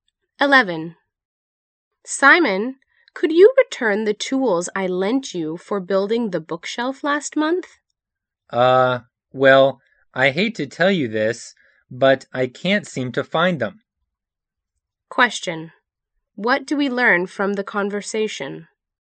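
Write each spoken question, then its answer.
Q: What do we learn from the conversation?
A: Simon can't find the tools he borrowed.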